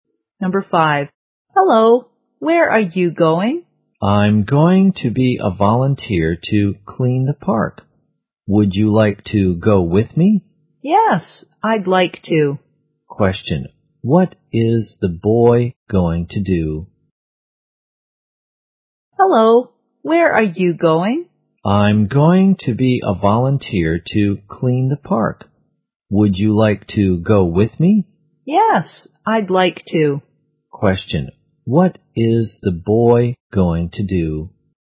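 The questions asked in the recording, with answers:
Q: what is the boy going to do?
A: Be a volunteer to clean the park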